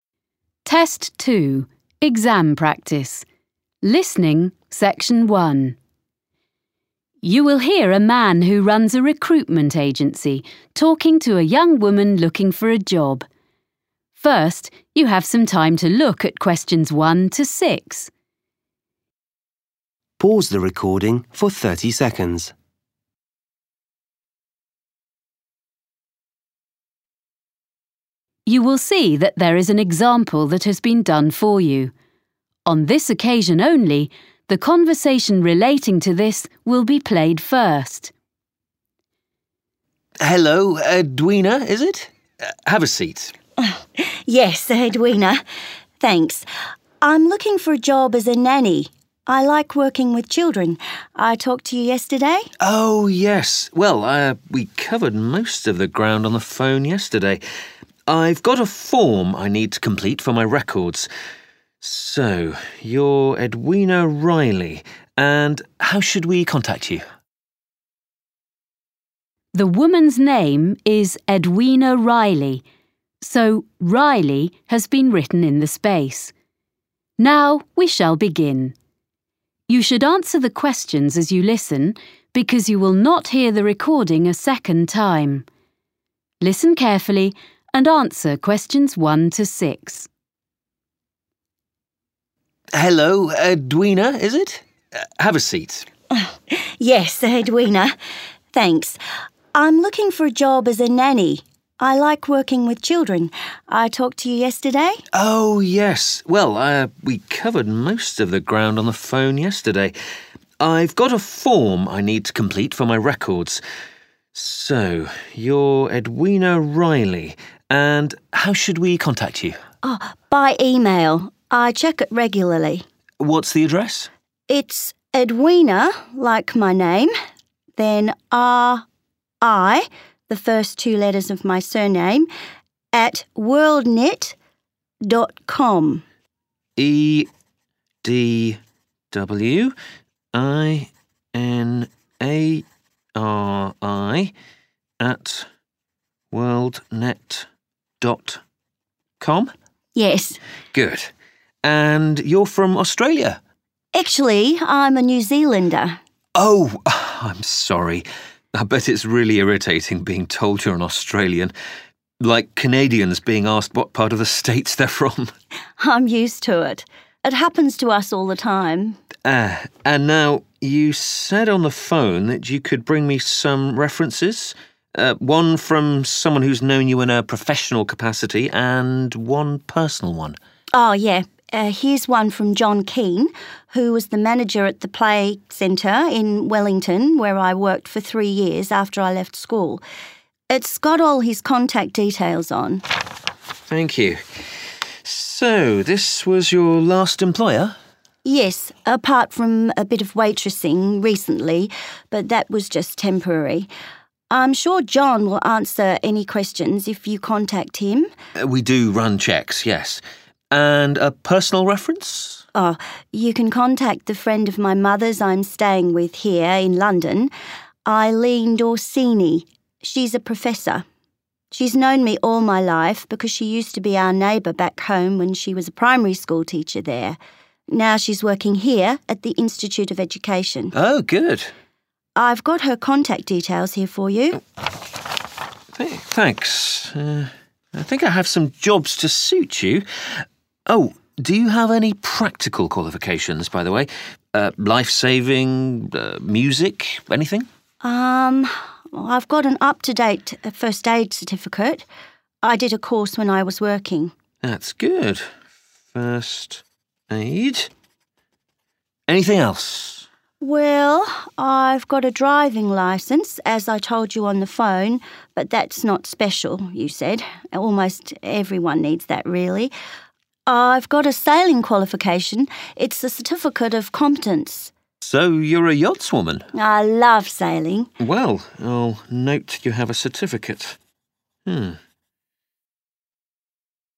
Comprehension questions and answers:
Questions 1-6. Complete the form below. Write NO MORE THAN TWO WORDS for each answer.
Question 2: Nationality: 2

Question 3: Job: manager of 3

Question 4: Job: 4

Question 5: current 5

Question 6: certificate of competence in 6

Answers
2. New Zealander
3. play centre
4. professor
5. first aid
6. sailing

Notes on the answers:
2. Actually, I'm a New Zealander. (Thực ra, tôi là người New Zealand.)
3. John Keen, who was the manager at the play centre in Wellington where l worked for three years after I left school. (John Keen, anh từng là quản lý tại trung tâm trò chơi ở Wellington, nơi tôi đã làm việc trong 3 năm sau khi tôi hoàn thành việc học.)
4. She's a professor. (Eileen Dorsini. Cô ấy là một giáo sư.)
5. I've got an up-to-date first aid certificate. (tôi đã có chứng chỉ sơ cứu gần đây.)